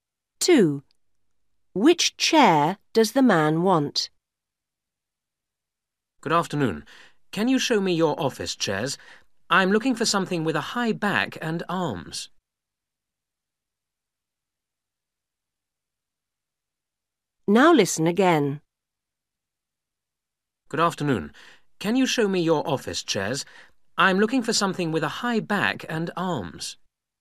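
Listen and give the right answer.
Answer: An office chair with a high back and arms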